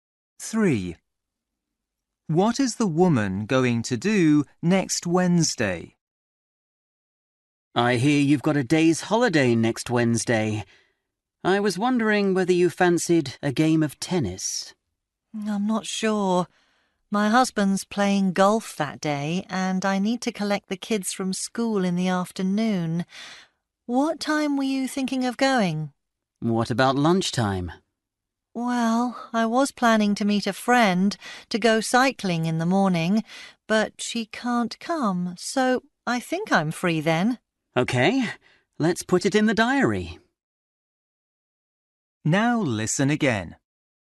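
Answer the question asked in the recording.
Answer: Play tennis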